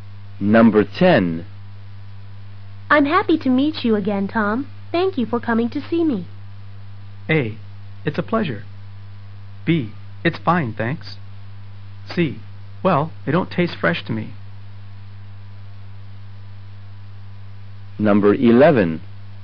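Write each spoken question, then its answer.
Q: Thank you for coming to see me.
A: A: It's a pleasure.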